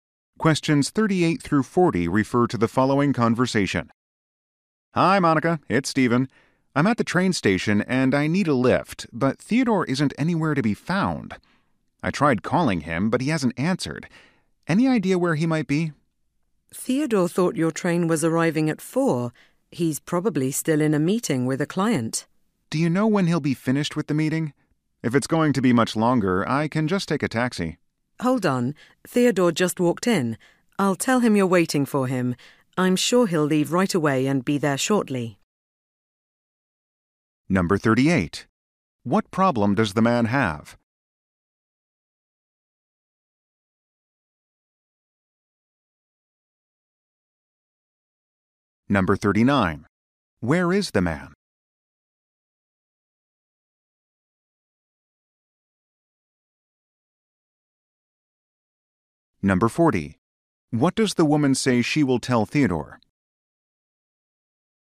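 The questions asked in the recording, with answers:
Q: What problem does the man have?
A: Nobody is there to pick him up

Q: Where is the man?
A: At the train station

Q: What does the woman say she will tell Theodore?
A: That the man is waiting for him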